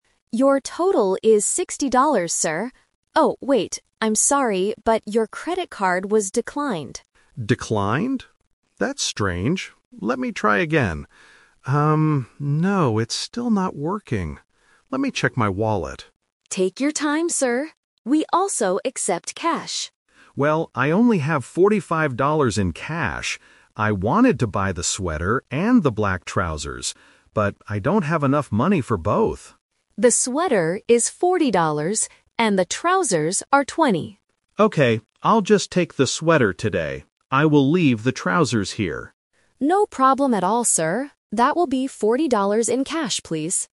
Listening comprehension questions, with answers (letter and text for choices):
Listen to the conversation between a cashier and a customer. Choose the correct answer (A, B, or C).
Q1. What is the man's problem at the beginning of the conversation?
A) He lost his credit card.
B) His credit card does not work.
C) He forgot his wallet at home.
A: B) His credit card does not work.

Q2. How much cash does the man have in his wallet?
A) $60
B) $40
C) $45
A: C) $45

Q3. What does the man decide to buy at the end?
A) Only the sweater.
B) Only the black trousers.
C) Both the sweater and the trousers.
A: A) Only the sweater.

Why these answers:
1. The cashier says his card was "declined," and Mark tries again but says, "it's still not working." Option (A) and (C) are incorrect because he has his card and his wallet with him at the store.
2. Mark clearly states, "I only have forty-five dollars in cash." Option (A) is the trap; $60 is the total price for both items. Option (B) is also a trap; $40 is the price of the sweater.
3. This question uses the "Twist" technique. Mark originally wanted to buy both items (Option C - the trap). Because he doesn't have enough cash, he changes his plan and says, "I'll just take the sweater today. I will leave the trousers here." Option (B) is the item he leaves behind.